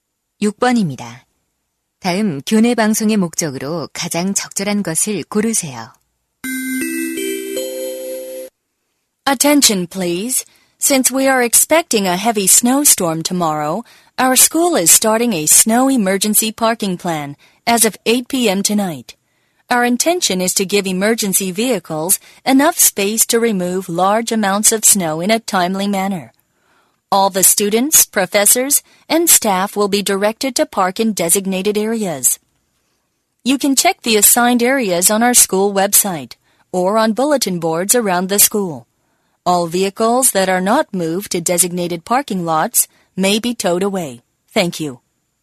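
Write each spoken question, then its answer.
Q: 다음 교내 방송의 목적으로 가장 적절한 것을 고르세요.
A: 폭설 대비 비상 주차 계획 안내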